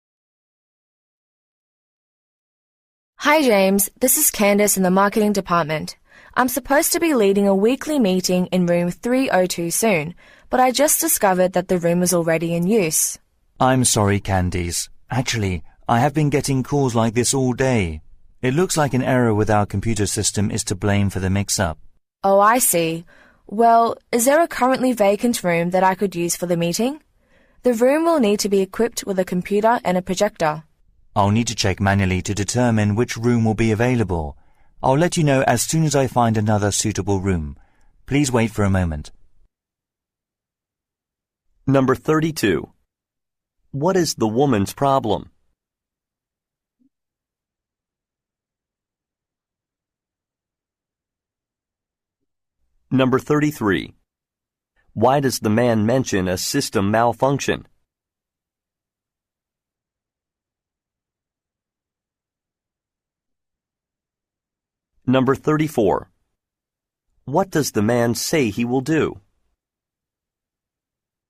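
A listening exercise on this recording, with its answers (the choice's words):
What is the woman's problem?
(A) A meeting room is occupied.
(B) A piece of equipment is out of stock.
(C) An appointment has been canceled.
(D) Some software is not installed.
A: A meeting room is occupied.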